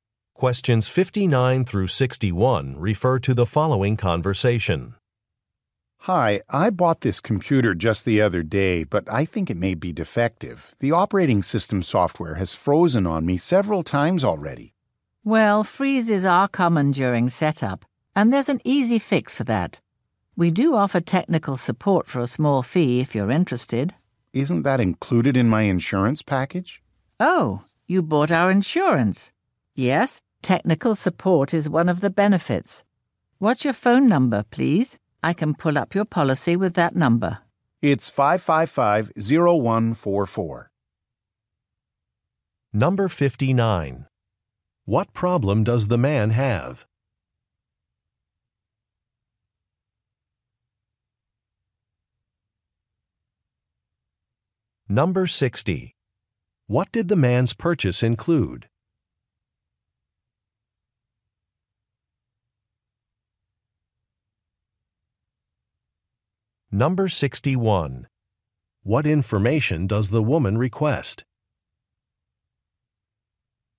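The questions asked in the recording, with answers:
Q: What problem does the man have?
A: His computer's software keeps freezing

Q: What did the man's purchase include?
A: An insurance package with technical support

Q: What information does the woman request?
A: His phone number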